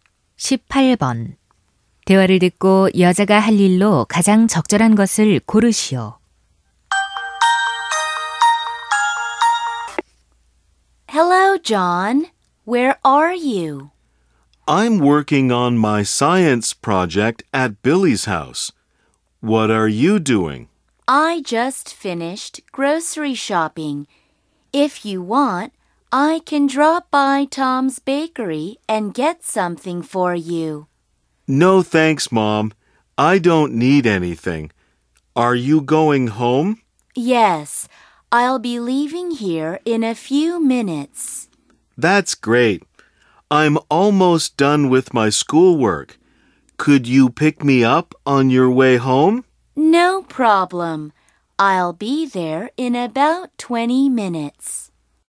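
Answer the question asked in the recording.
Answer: 집에 가는 길에 John을 데리러 가기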